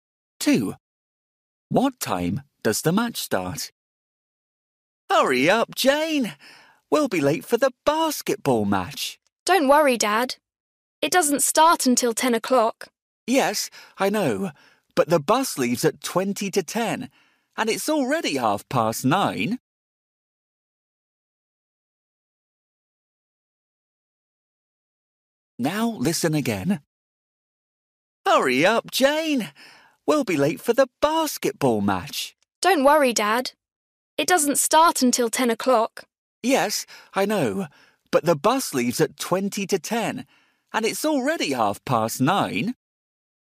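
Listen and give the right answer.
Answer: 10 o'clock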